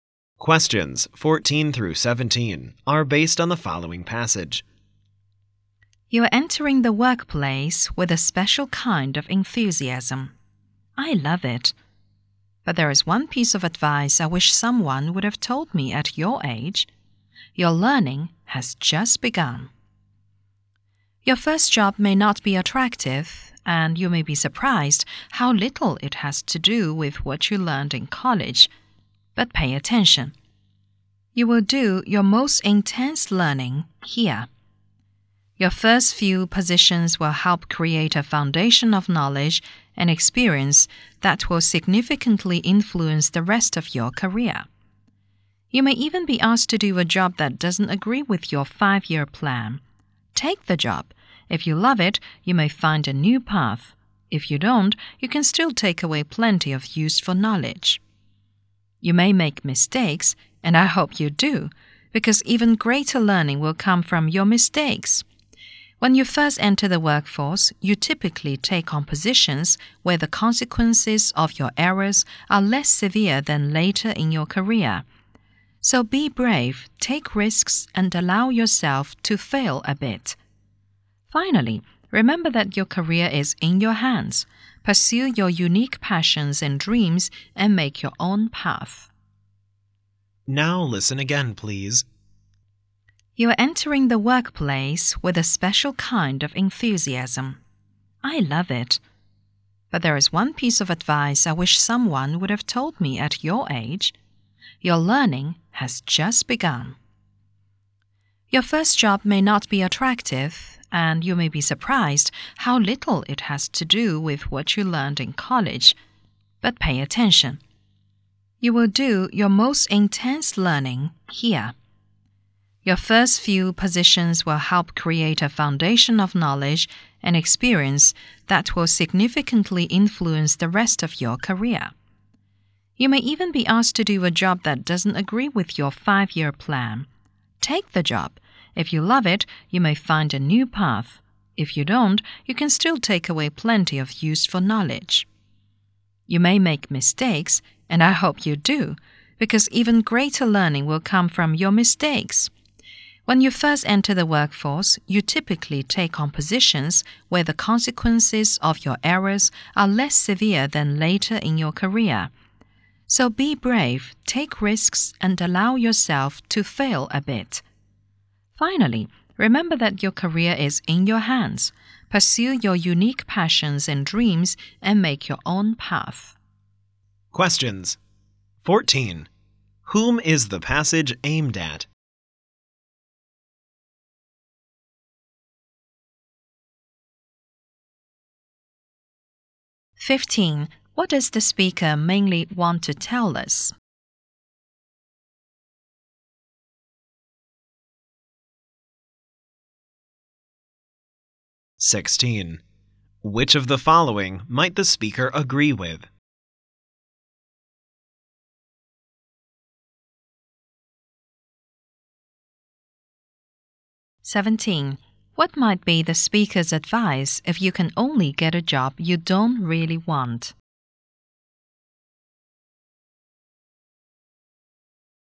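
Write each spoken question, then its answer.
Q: Whom is the passage aimed at?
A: College graduates entering the workplace

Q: What does the speaker mainly want to tell us?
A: Learning continues after you start work

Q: What might be the speaker's advice if you can only get a job you don't really want?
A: Take the job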